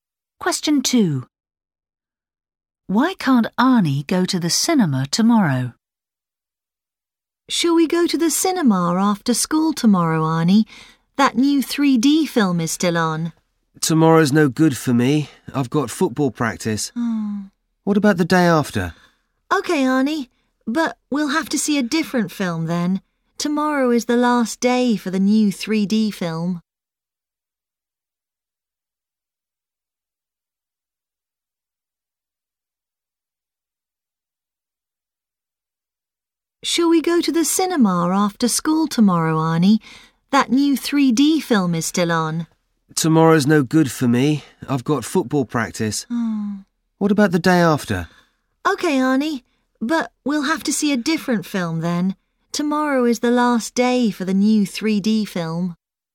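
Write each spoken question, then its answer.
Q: Why can't Arnie go to the cinema tomorrow?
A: He has football practice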